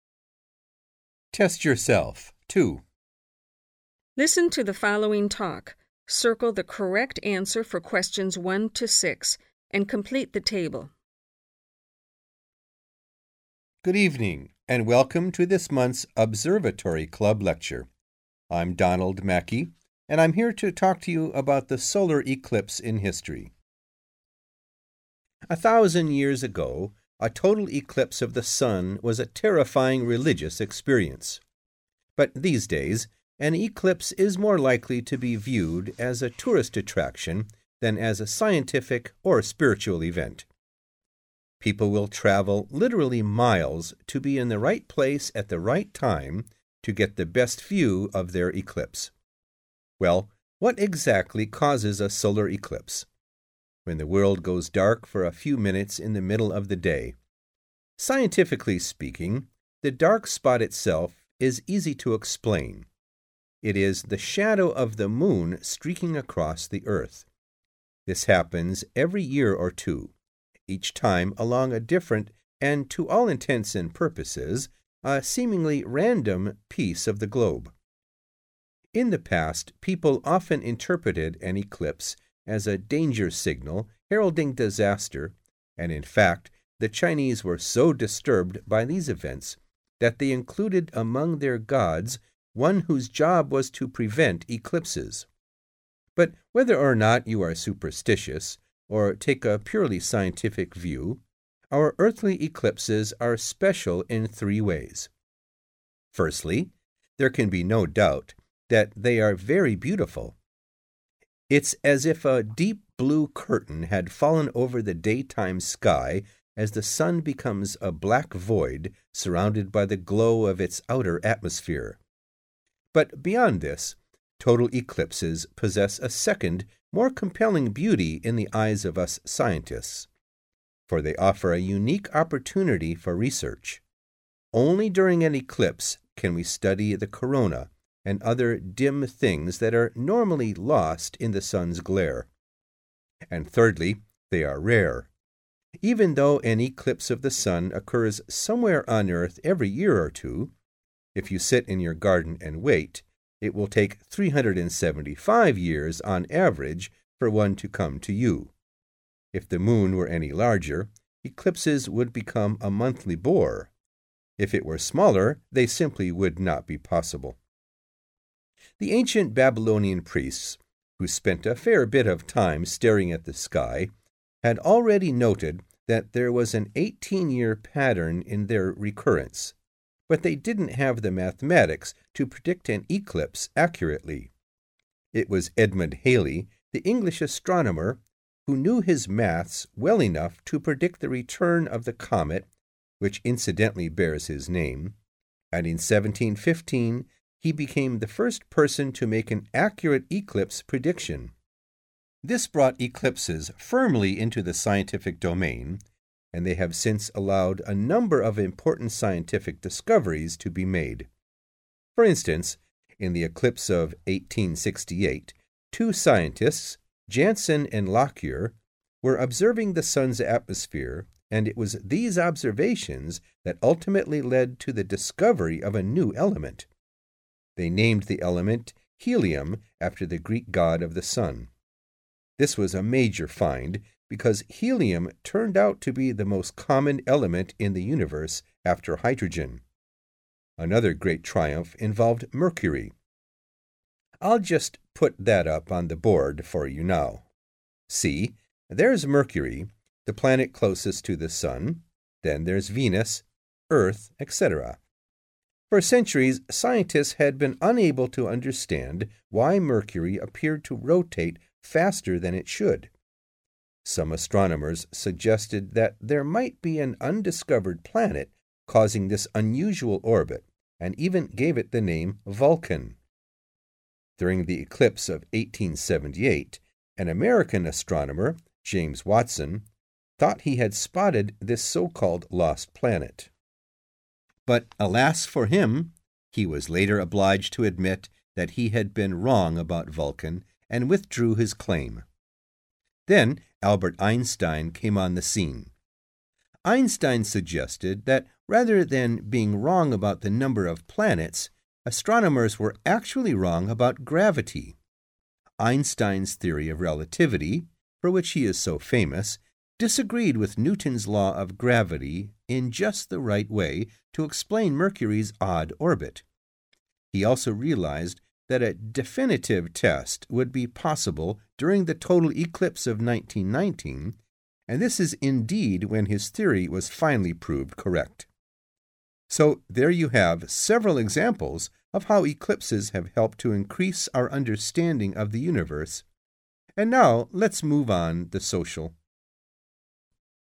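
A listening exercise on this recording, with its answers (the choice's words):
Listen to the talk and circle the correct answer for each question.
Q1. The speaker compares a solar eclipse today to a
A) religious experience.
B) scientific event.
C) popular spectacle.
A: popular spectacle.

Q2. The speaker says that the dark spot of an eclipse is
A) simple to predict.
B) easy to explain.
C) randomly occurring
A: easy to explain.

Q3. With regard to an eclipse, the ancient Chinese were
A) fascinated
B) rational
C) terrified.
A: terrified.

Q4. For the speaker, the most impressive aspect of an eclipse is the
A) exceptional beauty of the sky.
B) chance for scientific study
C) effect of the moon on the sun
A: chance for scientific study

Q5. Eclipses occur rarely because of the size of the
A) moon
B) sun.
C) earth.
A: moon

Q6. In predicting eclipses, the Babylonians were restricted by their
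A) religious attitudes.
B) inaccurate observations.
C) limited ability to calculate.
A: limited ability to calculate.

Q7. ................... who accurately predicted an eclipse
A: first person

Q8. discovered (8) .............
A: helium

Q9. believe he had found (9) .............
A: lost planet (Vulcan)

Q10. realised astronomers had misunderstood (10) ..............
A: gravity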